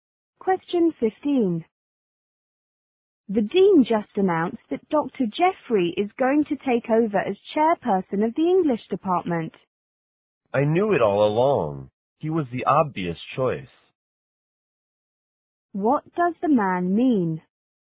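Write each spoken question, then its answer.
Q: What does the man mean?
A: He isn't surprised Dr. Jeffrey was chosen.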